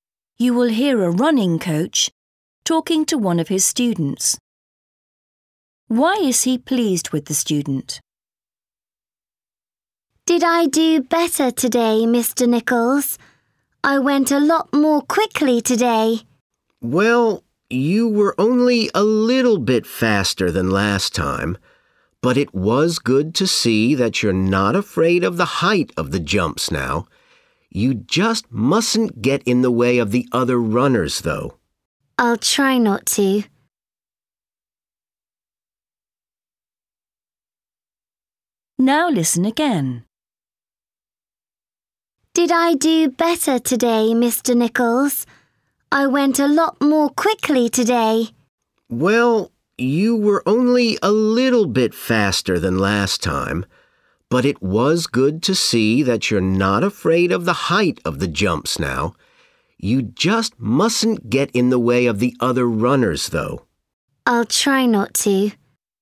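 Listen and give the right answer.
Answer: he's no longer afraid of the height of the jumps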